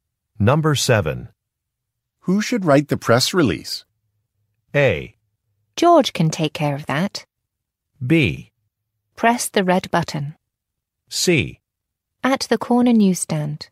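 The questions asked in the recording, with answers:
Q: Who should write the press release?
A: A: George can take care of that.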